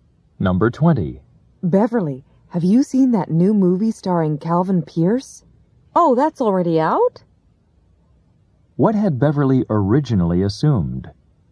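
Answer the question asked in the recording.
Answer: That the movie was not out yet.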